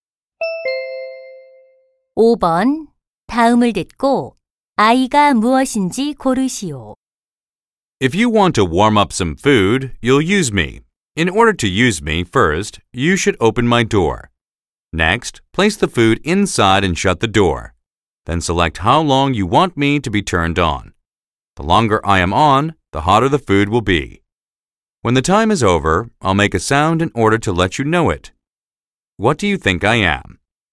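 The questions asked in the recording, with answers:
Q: 다음을 듣고 아이가 무엇인지 고르시오.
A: 전자레인지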